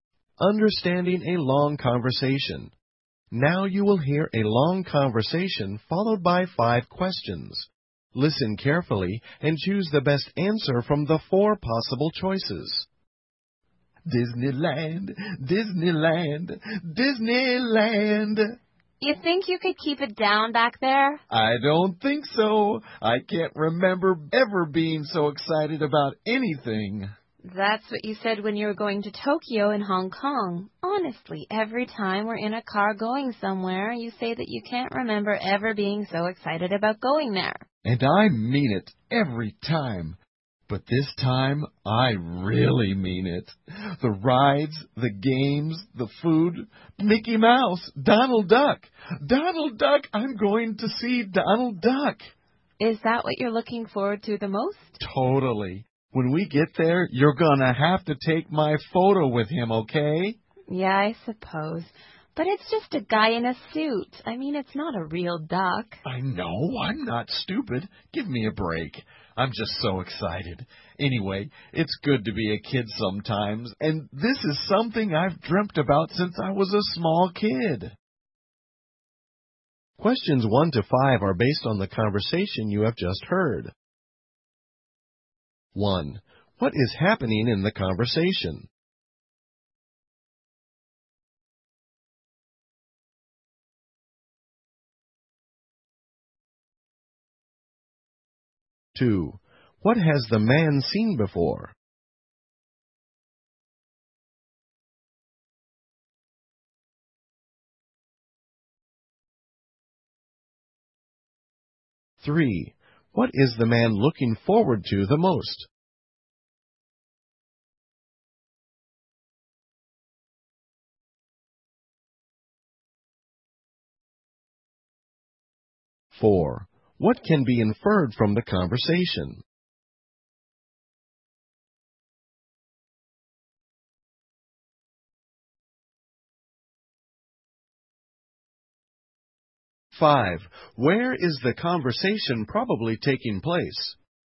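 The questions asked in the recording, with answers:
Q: What is happening in the conversation?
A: They are going to Disneyland by car

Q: Where is the conversation probably taking place?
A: In a car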